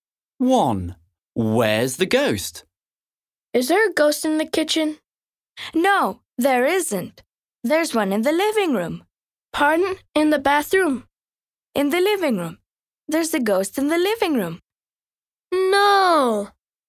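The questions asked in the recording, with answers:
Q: Where's the ghost?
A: In the living room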